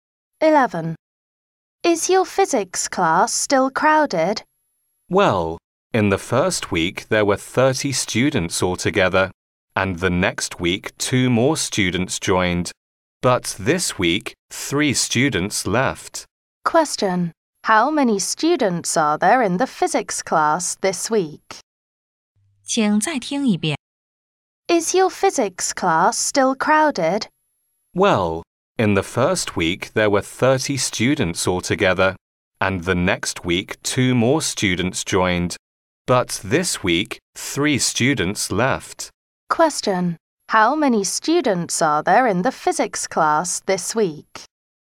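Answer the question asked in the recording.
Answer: 29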